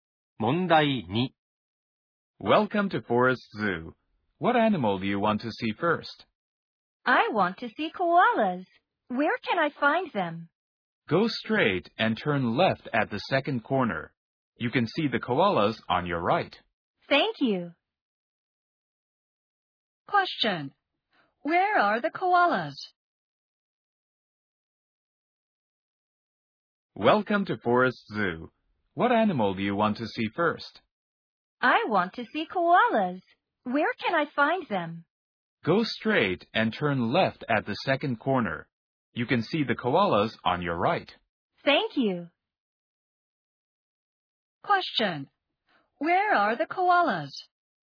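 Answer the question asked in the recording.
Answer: Go straight, turn left at the second corner; they are on the right.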